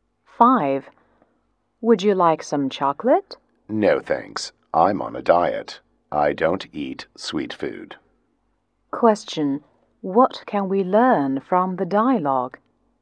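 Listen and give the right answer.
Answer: The speaker is on a diet and doesn't eat sweet food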